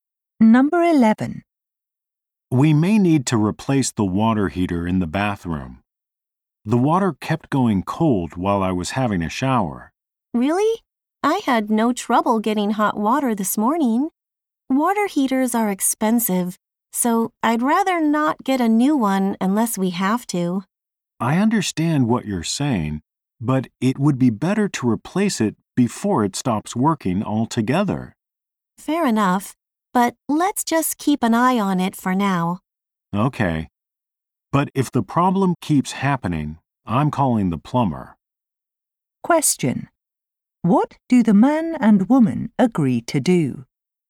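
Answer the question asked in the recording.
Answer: Keep an eye on the water heater for now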